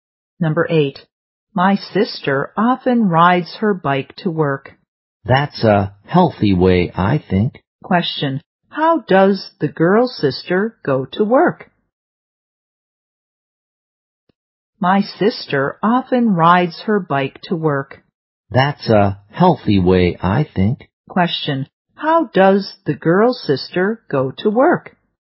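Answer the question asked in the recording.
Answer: By bike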